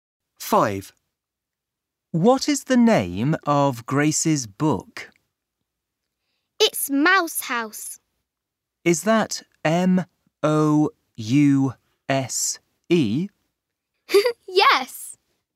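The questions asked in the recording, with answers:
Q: What is the name of Grace's book?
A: Mouse House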